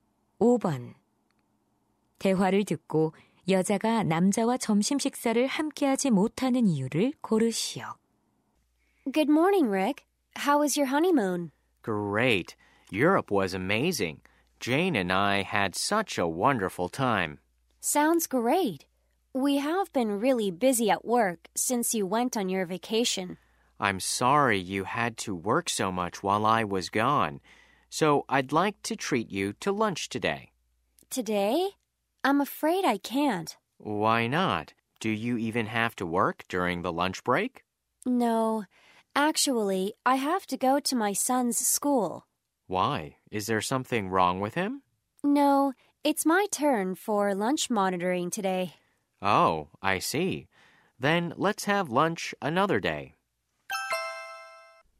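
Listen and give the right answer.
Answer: 아들 학교의 점심 지도 당번이라서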